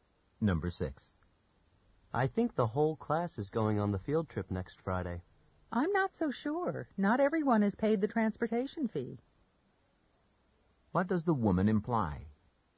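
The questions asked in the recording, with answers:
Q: What does the woman imply?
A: Not everyone may go on the trip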